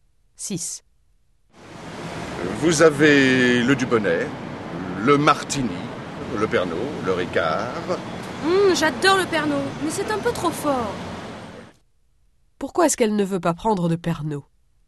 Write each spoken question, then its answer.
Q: Pourquoi est-ce qu'elle ne veut pas prendre de Pernod?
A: Parce que c'est un peu trop fort.